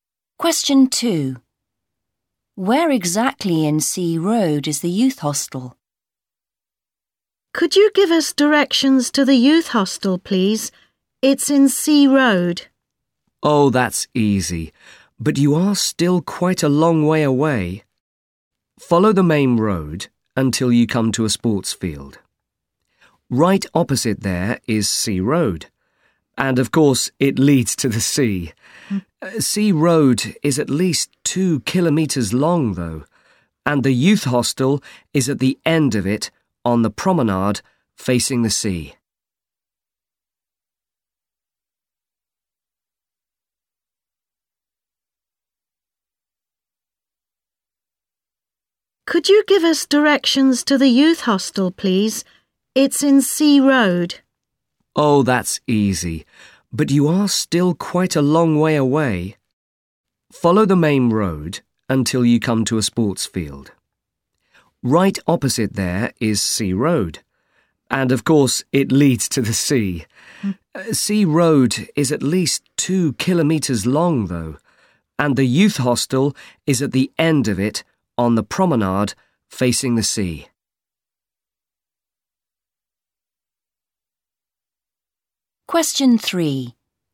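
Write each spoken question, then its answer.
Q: Where exactly in C Road is the youth hostel?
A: At the end of it, on the promenade facing the sea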